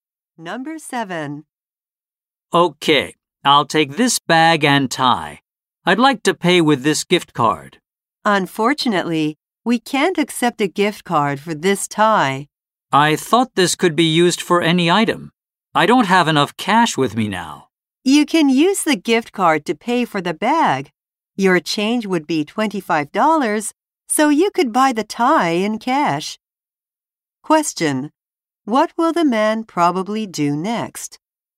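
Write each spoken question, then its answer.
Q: What will the man probably do next?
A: Pay for the bag with the gift card and buy the tie with the cash change.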